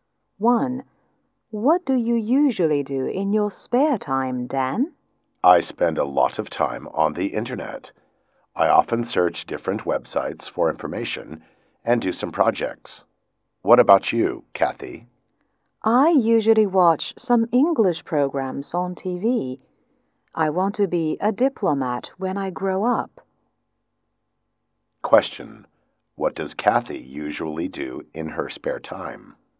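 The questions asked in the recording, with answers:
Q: What does Kathy usually do in her spare time?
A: She watches English programs on TV.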